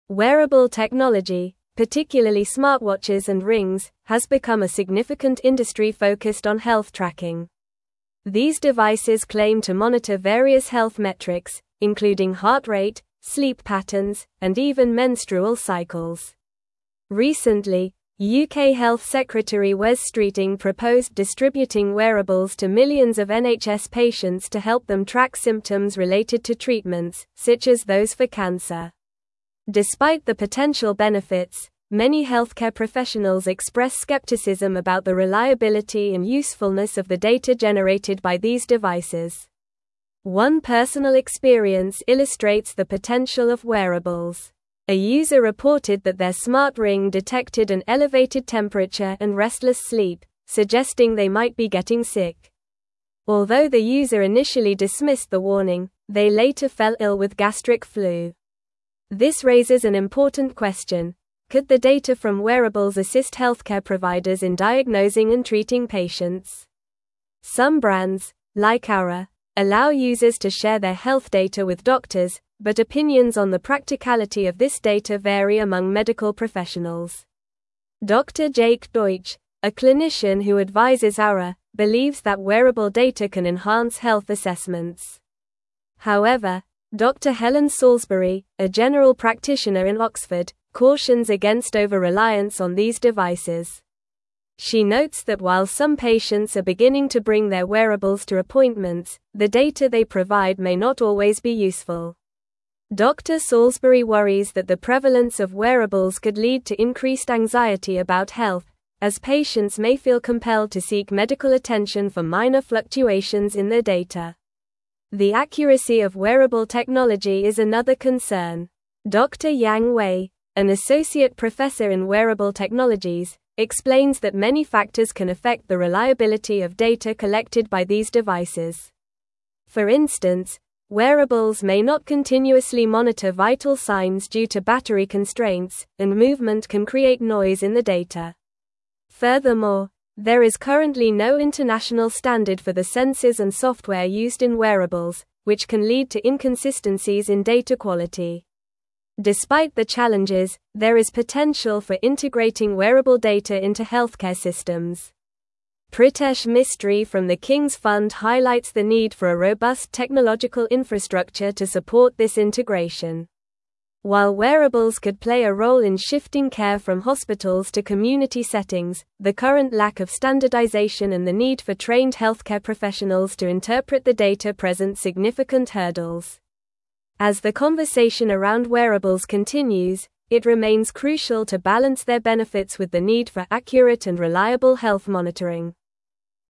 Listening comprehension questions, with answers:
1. These devices claim to monitor various health metrics, including heart rate, sleep (1)______, and even (2)______ cycles.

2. These devices claim to monitor various health metrics, including heart rate, sleep (1)______, and even (2)______ cycles.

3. Recently, UK Health Secretary Wes Streeting (3)______ distributing wearables to millions of NHS patients to help them track (4)______ related to treatments, such as those for cancer.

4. Recently, UK Health Secretary Wes Streeting (3)______ distributing wearables to millions of NHS patients to help them track (4)______ related to treatments, such as those for cancer.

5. A user reported that their smart ring detected an elevated temperature and (5)______ sleep, suggesting they might be getting sick.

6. Although the user initially dismissed the (6)______, they later fell ill with gastric flu.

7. could the data from (7)______s assist (8)______ providers in diagnosing and treating patients?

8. could the data from (7)______s assist (8)______ providers in diagnosing and treating patients?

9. She notes that while some patients are beginning to bring their wearables to appointments, the data they provide may not always be (9)______.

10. Dr. Salisbury worries that the prevalence of wearables could lead to increased anxiety about (10)______, as patients may feel compelled to seek medical attention for minor fluctuations in their data.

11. Dr. Yang Wei, an associate (11)______ in wearable technologies, explains that many factors can affect the reliability of data collected by these (12)______.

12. Dr. Yang Wei, an associate (11)______ in wearable technologies, explains that many factors can affect the reliability of data collected by these (12)______.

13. Furthermore, there is currently no international standard for the sensors and software used in (13)______, which can lead to inconsistencies in data quality.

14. Pritesh Mistry from the Kings Fund highlights the need for a (14)______ technological infrastructure to support this integration.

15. While wearables could play a role in shifting care from (15)______ to community settings, the current lack of standardization and the need for (16)______ healthcare professionals to interpret the data present significant hurdles.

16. While wearables could play a role in shifting care from (15)______ to community settings, the current lack of standardization and the need for (16)______ healthcare professionals to interpret the data present significant hurdles.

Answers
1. patterns
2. menstrual
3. proposed
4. symptoms
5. restless
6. warning
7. wearable
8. healthcare
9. useful
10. health
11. professor
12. devices
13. wearables
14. robust
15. hospitals
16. trained

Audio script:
Wearable technology, particularly smartwatches and rings, has become a significant industry focused on health tracking. These devices claim to monitor various health metrics, including heart rate, sleep patterns, and even menstrual cycles. Recently, UK Health Secretary Wes Streeting proposed distributing wearables to millions of NHS patients to help them track symptoms related to treatments, such as those for cancer. Despite the potential benefits, many healthcare professionals express skepticism about the reliability and usefulness of the data generated by these devices.
One personal experience illustrates the potential of wearables. A user reported that their smart ring detected an elevated temperature and restless sleep, suggesting they might be getting sick. Although the user initially dismissed the warning, they later fell ill with gastric flu. This raises an important question: could the data from wearables assist healthcare providers in diagnosing and treating patients? Some brands, like Oura, allow users to share their health data with doctors, but opinions on the practicality of this data vary among medical professionals.
Dr. Jake Deutsch, a clinician who advises Oura, believes that wearable data can enhance health assessments. However, Dr. Helen Salisbury, a general practitioner in Oxford, cautions against over-reliance on these devices. She notes that while some patients are beginning to bring their wearables to appointments, the data they provide may not always be useful. Dr. Salisbury worries that the prevalence of wearables could lead to increased anxiety about health, as patients may feel compelled to seek medical attention for minor fluctuations in their data.
The accuracy of wearable technology is another concern. Dr. Yang Wei, an associate professor in wearable technologies, explains that many factors can affect the reliability of data collected by these devices. For instance, wearables may not continuously monitor vital signs due to battery constraints, and movement can create noise in the data. Furthermore, there is currently no international standard for the sensors and software used in wearables, which can lead to inconsistencies in data quality.
Despite the challenges, there is potential for integrating wearable data into healthcare systems. Pritesh Mistry from the Kings Fund highlights the need for a robust technological infrastructure to support this integration. While wearables could play a role in shifting care from hospitals to community settings, the current lack of standardization and the need for trained healthcare professionals to interpret the data present significant hurdles. As the conversation around wearables continues, it remains crucial to balance their benefits with the need for accurate and reliable health monitoring.

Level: Level 4